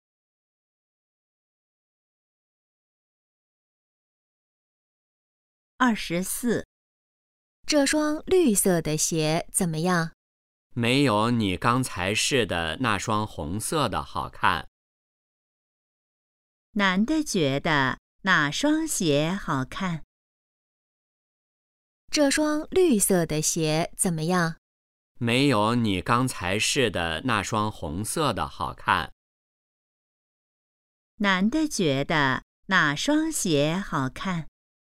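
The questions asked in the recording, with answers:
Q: 男的觉得哪双鞋好看?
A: 红色的那双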